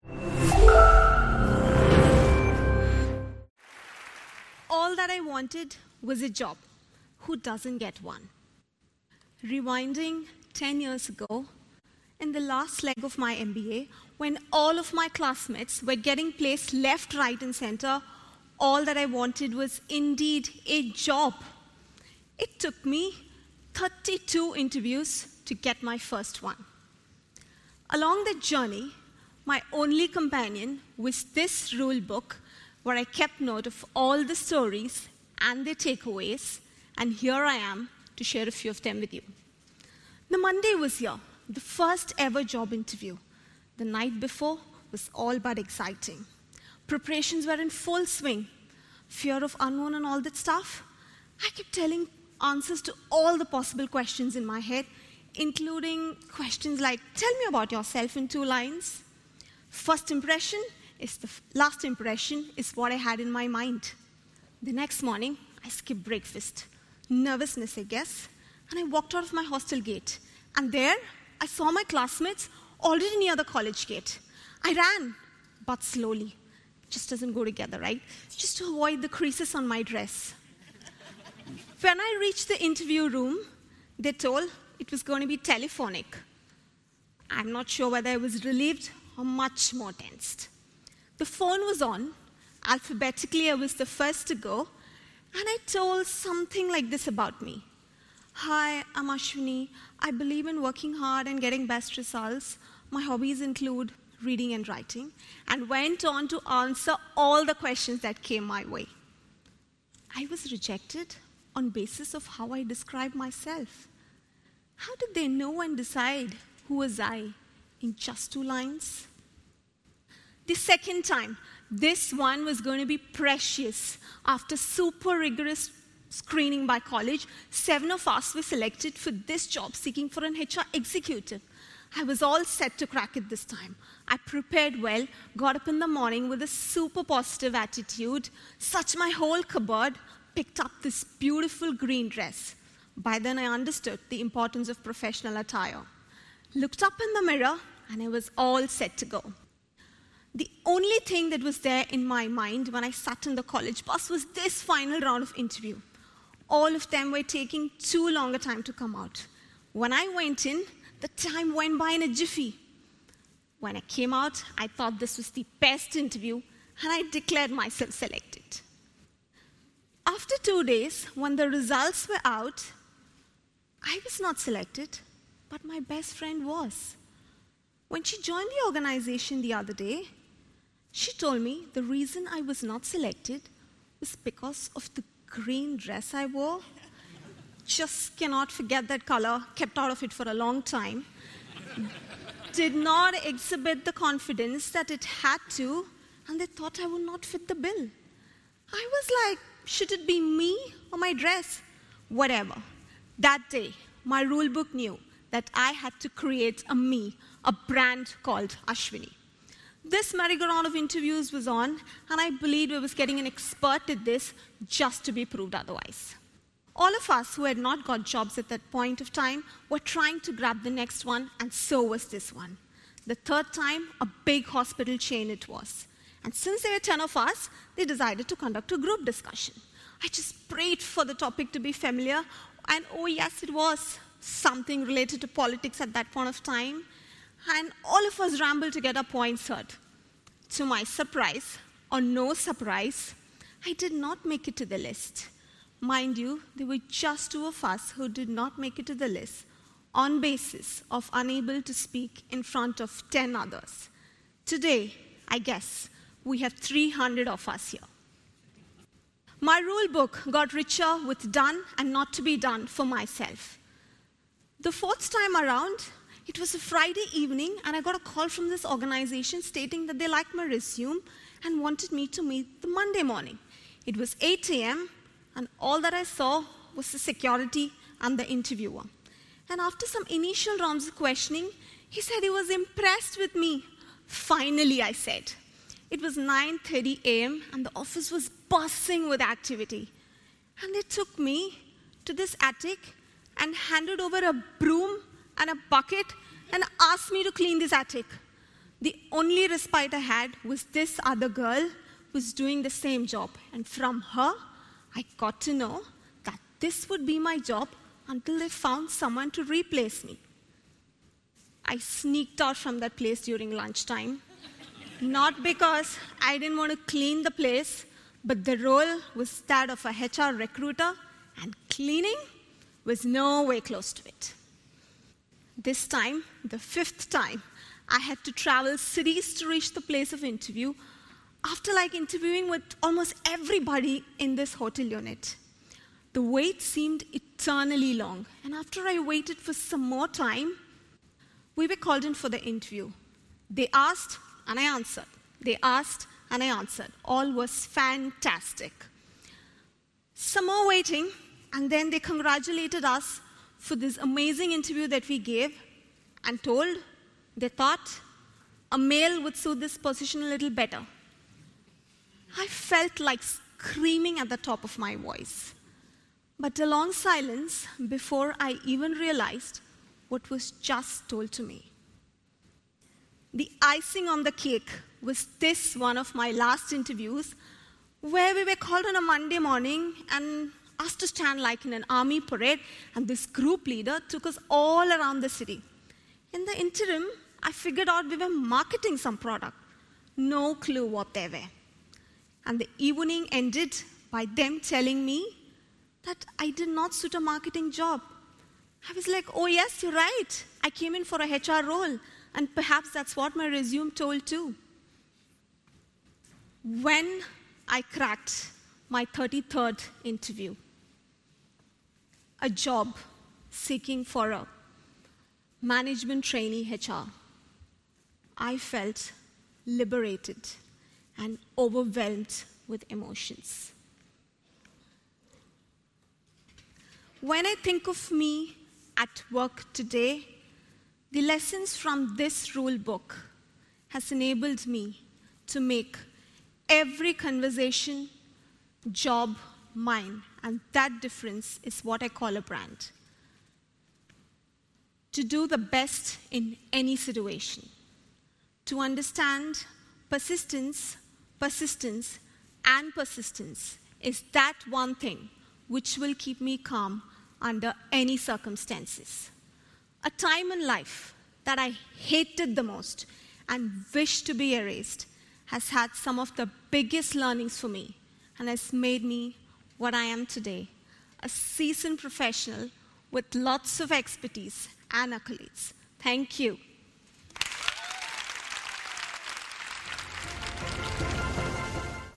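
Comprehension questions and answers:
用 1-2 句话用自己的话回答下面的问题。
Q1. How many interviews did the speaker go through before getting her first job offer?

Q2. What specific color of dress did she wear for her second interview that she later learned was the reason she was rejected?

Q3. During the fourth interview attempt, what task was she given after the initial questioning, and what time did the office visit start?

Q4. In the fifth interview, what reason were the candidates given for not getting the job after being congratulated on the interview?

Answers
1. 32 interviews
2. Green
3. She was given a broom and bucket to clean the attic; the visit started at 8 a.m.
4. They thought a male would suit the position better.

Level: CEFRB2-C1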